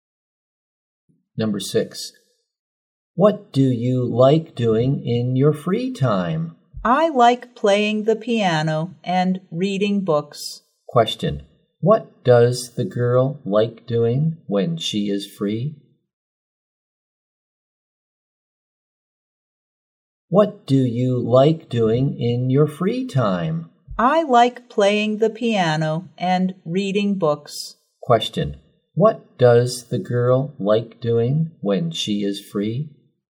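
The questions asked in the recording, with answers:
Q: Question, what does the girl like doing when she is free?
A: Playing the piano and reading books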